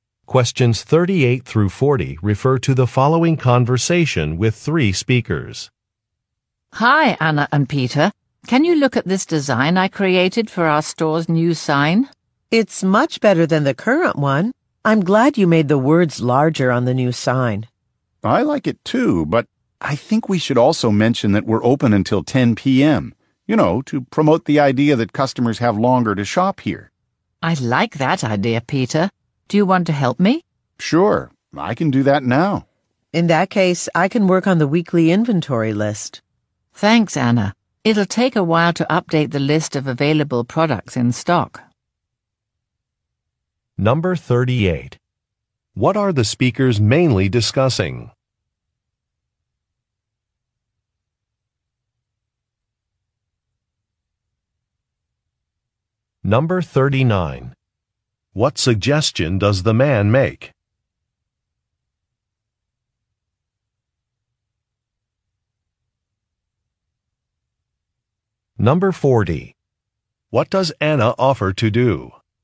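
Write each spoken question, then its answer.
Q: What are the speakers mainly discussing?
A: A design for the store's new sign

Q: What suggestion does the man make?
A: Mention on the sign that the store is open until 10 p.m.

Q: What does Anna offer to do?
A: Work on the weekly inventory list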